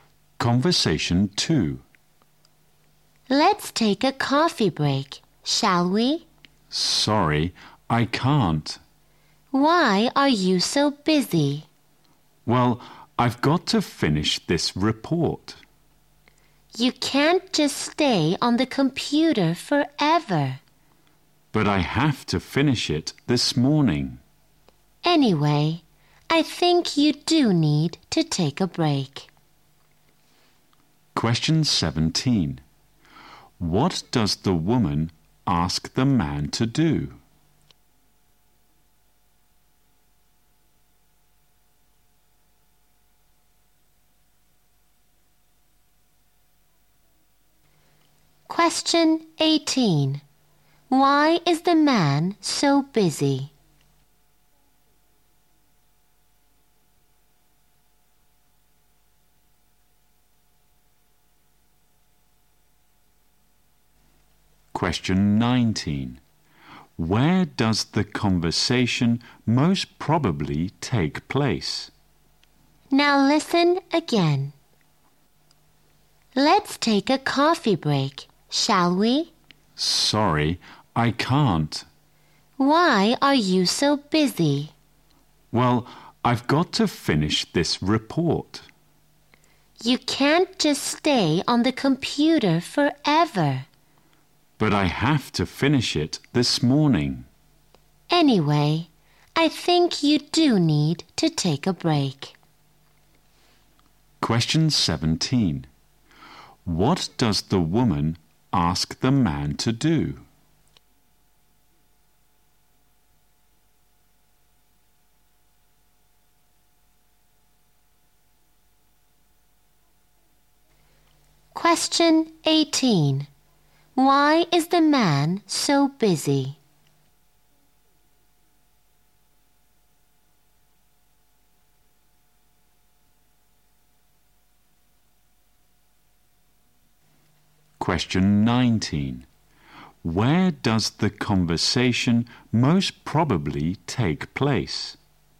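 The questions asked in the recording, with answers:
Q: What does the woman ask the man to do?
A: Take a coffee break

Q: Why is the man so busy?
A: He has to finish a report this morning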